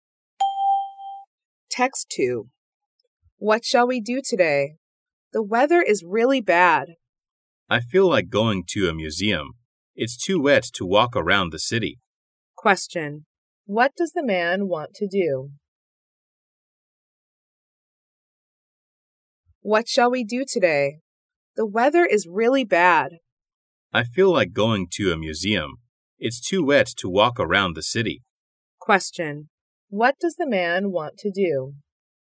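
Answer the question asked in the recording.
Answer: Go to a museum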